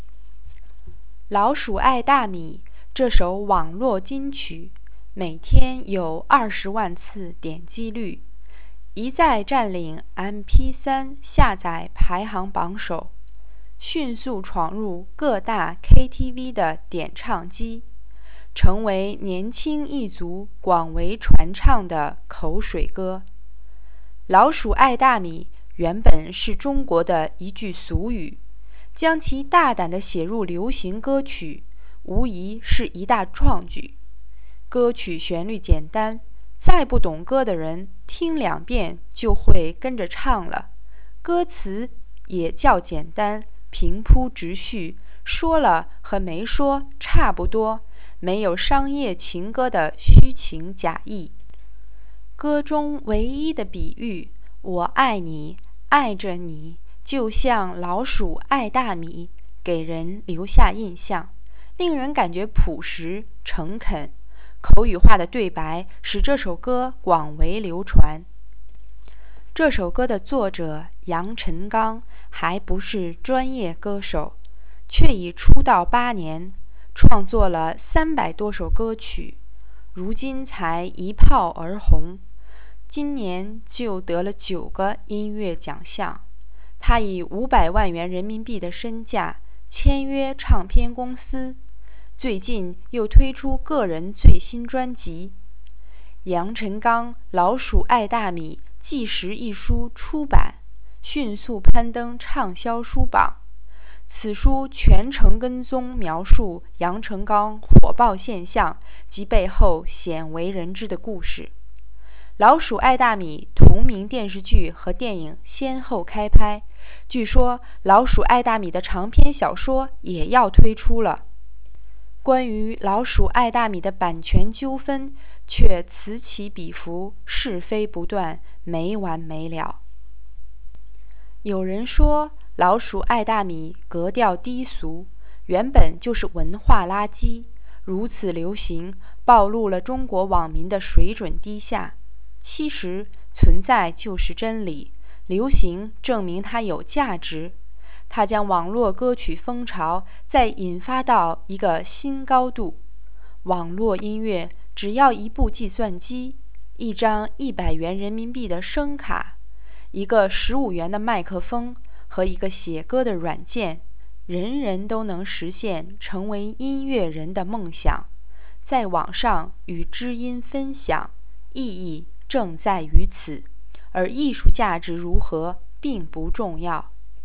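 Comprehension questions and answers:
Please answer the following questions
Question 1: 《老鼠爱大米》这首歌受欢迎到什么程度?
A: 每天有二十万次点击率,一再占领MP3下载排行榜首,闯入各大KTV点唱机,成为年轻人广为传唱的口水歌。

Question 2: 为什么这首歌这么受欢迎?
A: 旋律简单,歌词平铺直叙、朴实诚恳,没有虚情假意,口语化的对白使它广为流传。

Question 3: 《老鼠爱大米》这首歌引发了什么现象?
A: 作者签约唱片公司、出专辑,纪实书出版,电视剧和电影开拍,小说要推出,版权纠纷不断,把网络歌曲风潮推到新高度。

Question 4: 网络音乐是怎么做出来的?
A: 只要一部计算机、一张100元的声卡、一个15元的麦克风和一个写歌的软件。

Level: 3rd Year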